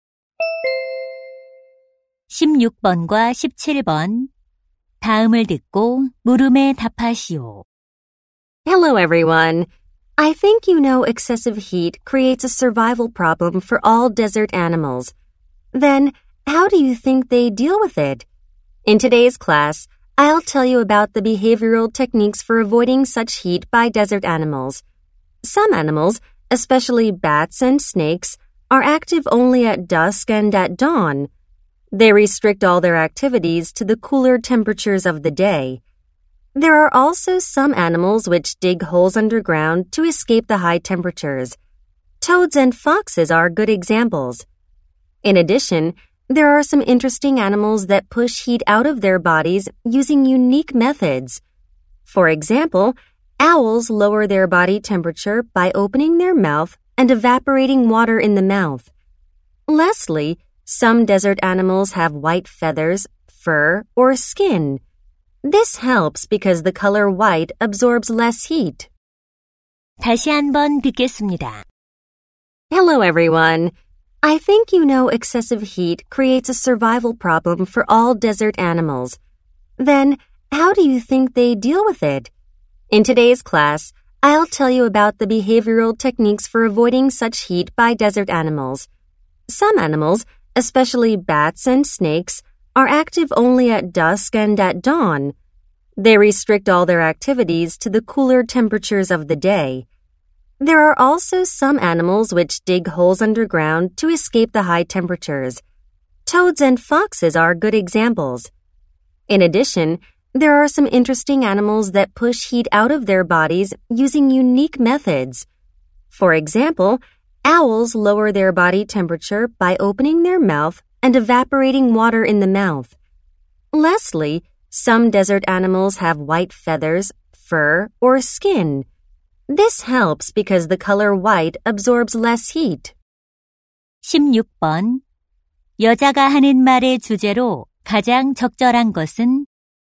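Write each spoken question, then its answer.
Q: 여자가 하는 말의 주제로 가장 적절한 것은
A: 사막 동물들이 더위를 피하는 행동 방법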